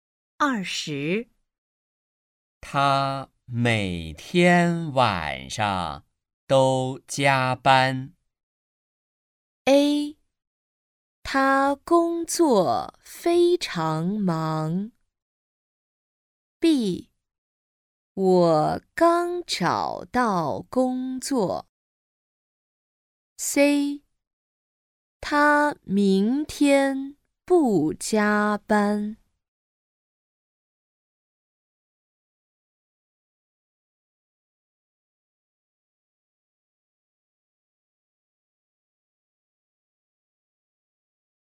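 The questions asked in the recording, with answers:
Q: 他每天晚上都加班。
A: A: 他工作非常忙。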